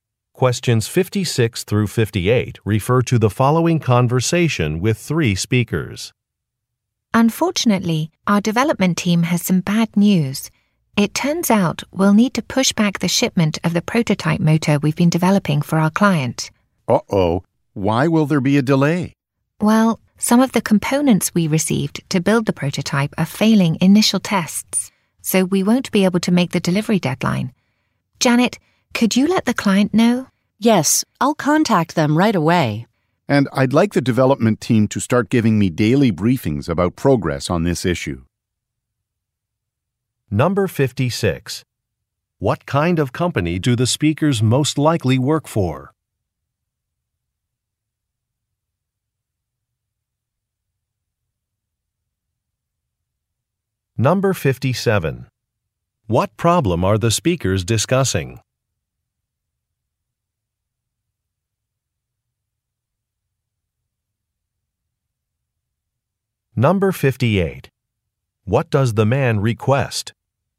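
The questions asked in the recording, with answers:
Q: What kind of company do the speakers most likely work for?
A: A company that develops motors (manufacturer)

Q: What problem are the speakers discussing?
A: A shipment delay because components failed tests

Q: What does the man request?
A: Daily progress briefings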